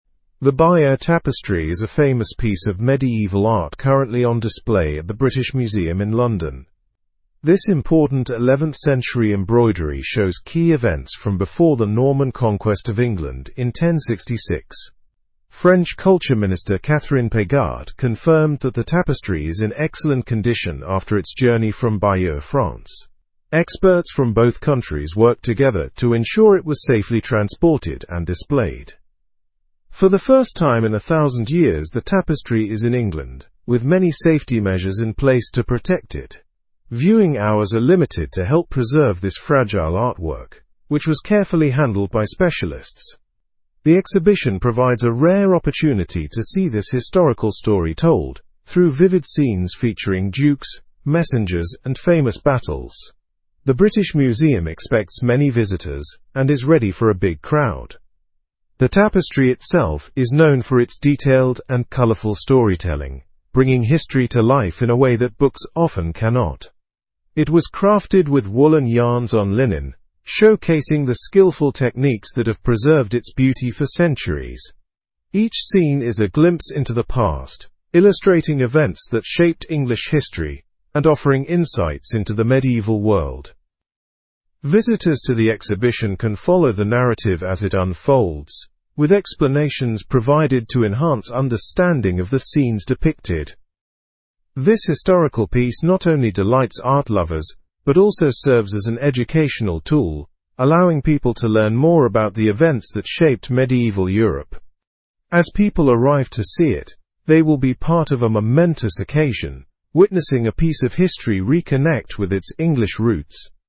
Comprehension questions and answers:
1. What is currently on display at the British Museum in London?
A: The Bayeux Tapestry.

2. What does the Bayeux Tapestry show?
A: Key events from before the Norman Conquest of England in

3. How did French and British experts contribute to the tapestry's exhibition?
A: They collaborated to ensure its safe transport and display.

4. Why are viewing hours limited for the tapestry?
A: To help preserve the fragile artwork.

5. What material is the Bayeux Tapestry made of?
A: Woolen yarns on linen.

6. Why is the exhibit considered a rare opportunity?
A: Because it has not been on English soil for a thousand years.

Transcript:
The Bayeux Tapestry is a famous piece of medieval art currently on display at the British Museum in London. This important 11th-century embroidery shows key events from before the Norman Conquest of England in 1066. French Culture Minister Catherine Pégard confirmed that the tapestry is in excellent condition after its journey from Bayeux, France. Experts from both countries worked together to ensure it was safely transported and displayed.
For the first time in a thousand years, the tapestry is in England, with many safety measures in place to protect it. Viewing hours are limited to help preserve this fragile artwork, which was carefully handled by specialists. The exhibition provides a rare opportunity to see this historical story told through vivid scenes featuring dukes, messengers, and famous battles. The British Museum expects many visitors and is ready for a big crowd.
The tapestry itself is known for its detailed and colorful storytelling, bringing history to life in a way that books often cannot. It was crafted with woolen yarns on linen, showcasing the skillful techniques that have preserved its beauty for centuries. Each scene is a glimpse into the past, illustrating events that shaped English history and offering insights into the medieval world.
is a glimpse into the past, illustrating events that shaped English history and offering insights into the medieval world. to the exhibition can follow the ? as it unfolds, with explanations provided to enhance understanding of the scenes depicted. This historical piece not only delights art lovers but also serves as an educational tool, allowing ? to ? more about the events that shaped medieval Europe. As people arrive to see it, they will be part of a momentous occasion, witnessing a piece of history ? with its English roots.

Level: Level 3